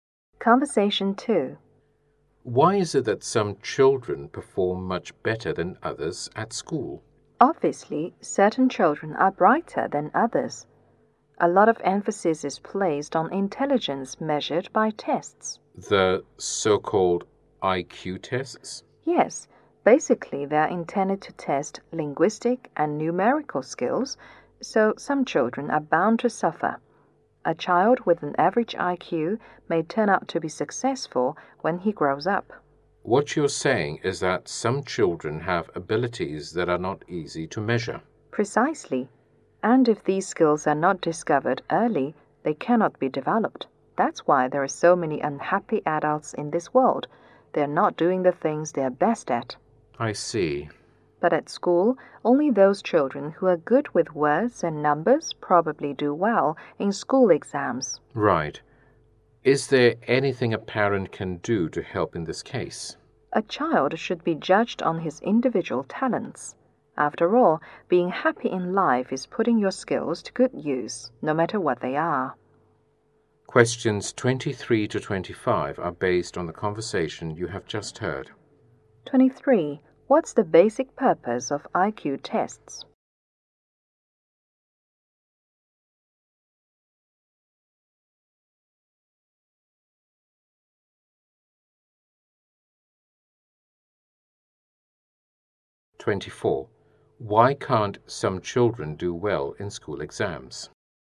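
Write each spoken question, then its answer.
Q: What's the basic purpose of IQ tests?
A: To test linguistic and numerical skills

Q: Why can't some children do well in school exams?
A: Their abilities are not easy to measure; exams favor those good with words and numbers.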